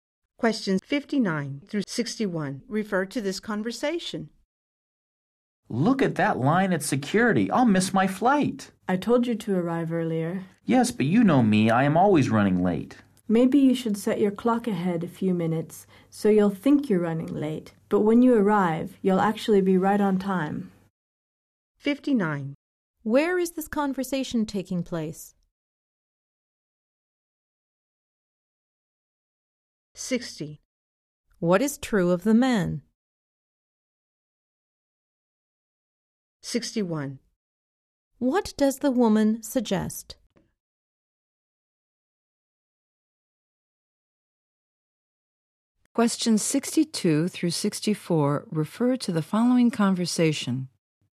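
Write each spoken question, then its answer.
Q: Where is this conversation taking place?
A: At an airport

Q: What does the woman suggest?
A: Setting his clock a few minutes ahead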